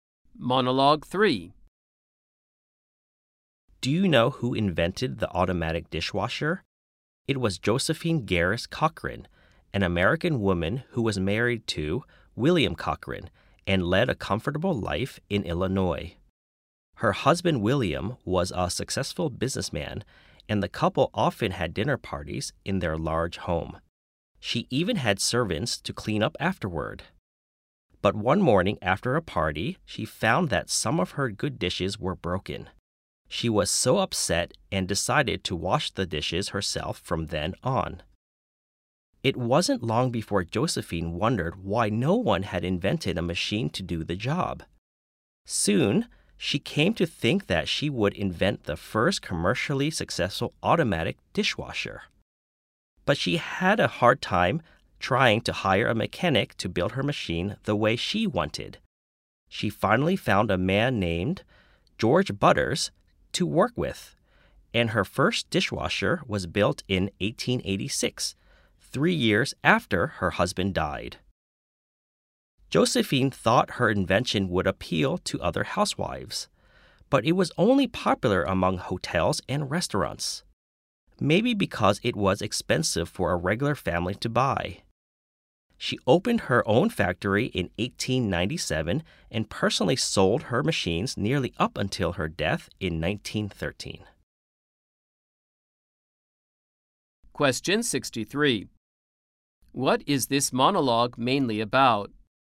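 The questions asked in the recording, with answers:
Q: What is this monologue mainly about?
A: Josephine Cochran's invention of the automatic dishwasher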